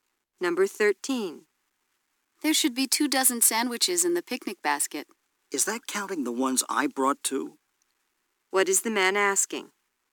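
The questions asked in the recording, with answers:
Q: What is the man asking?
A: Whether the two dozen includes the sandwiches he brought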